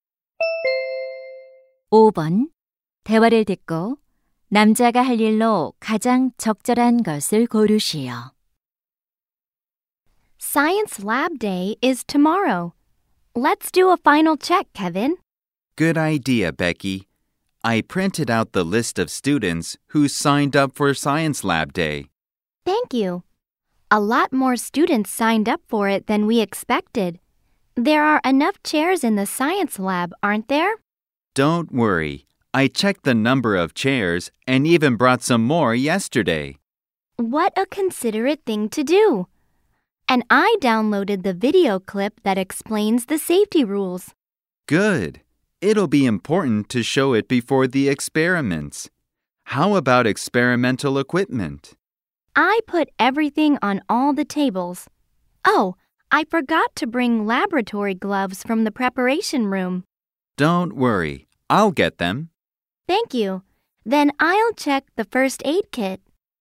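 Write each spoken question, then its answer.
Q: 대화를 듣고 남자가 할 일로 가장 적절한 것을 고르시오.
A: 준비실에서 실험용 장갑 가져오기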